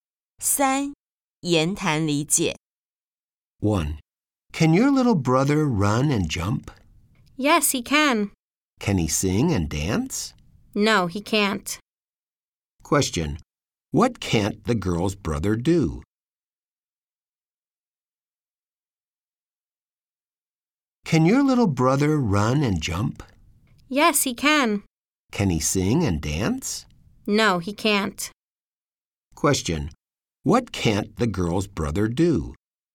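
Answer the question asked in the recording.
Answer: Sing and dance.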